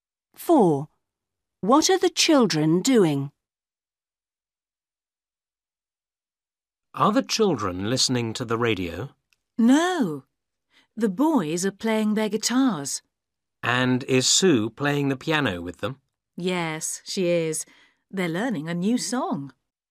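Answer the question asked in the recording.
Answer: playing guitars and piano, learning a new song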